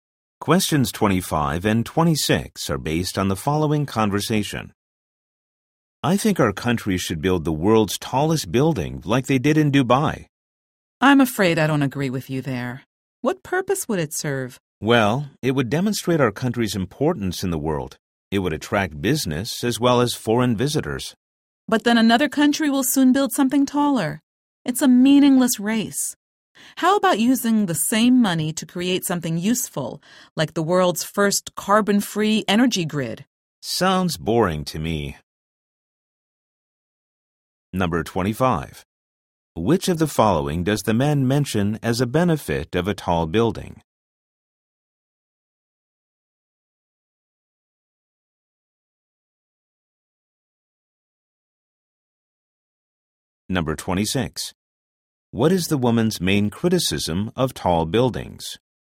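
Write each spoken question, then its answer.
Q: Which of the following does the man mention as a benefit of a tall building?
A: It would attract business and foreign visitors

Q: What is the woman's main criticism of tall buildings?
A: It's a meaningless race; another country will build taller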